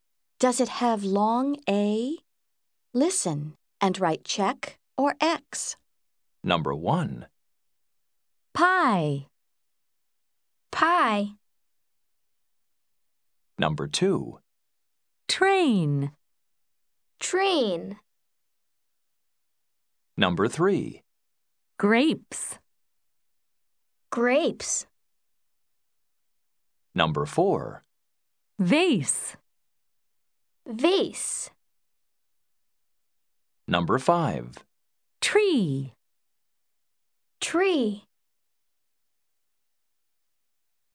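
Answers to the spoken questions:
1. No (pie)
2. Yes (train)
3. Yes (grapes)
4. Yes (vase)
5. No (tree)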